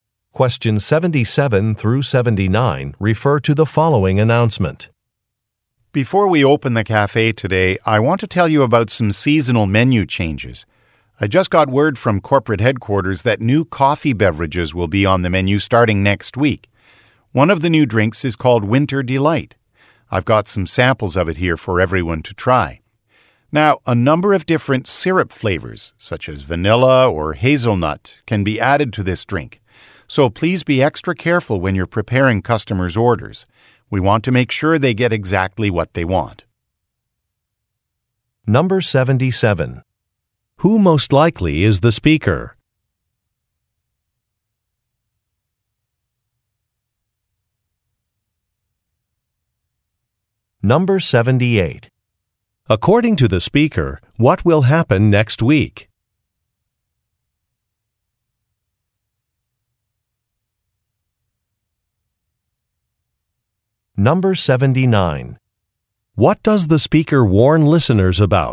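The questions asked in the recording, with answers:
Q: According to the speaker, what will happen next week?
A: New coffee drinks will be added to the menu

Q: What does the speaker warn listeners about?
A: To be careful preparing orders, since different syrup flavors can be added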